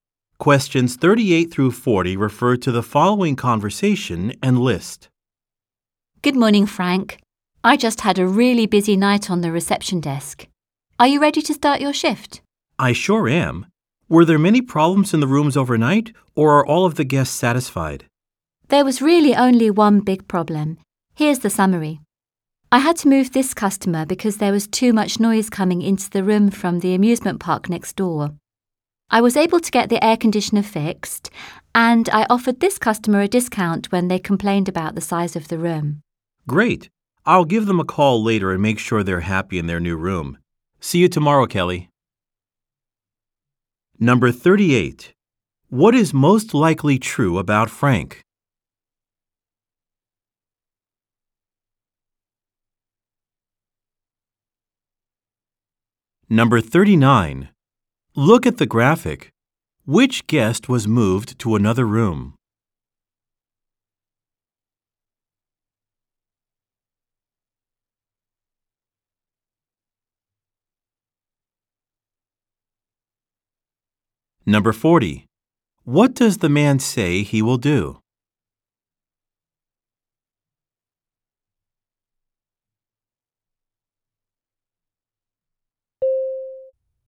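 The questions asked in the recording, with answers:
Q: What is most likely true about Frank?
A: He works at the hotel reception desk and is starting his shift

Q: What does the man say he will do?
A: Call the guest who was moved to make sure they are happy in the new room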